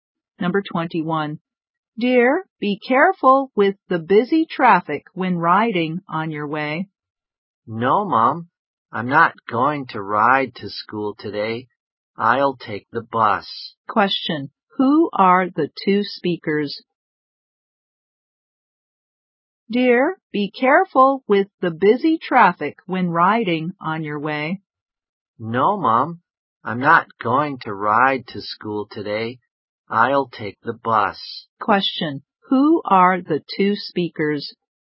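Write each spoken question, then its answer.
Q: Who are the two speakers?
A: A mother and her child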